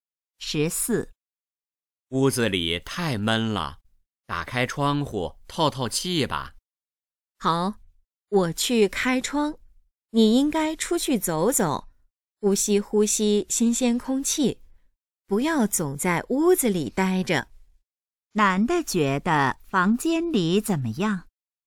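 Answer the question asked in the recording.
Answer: 太闷了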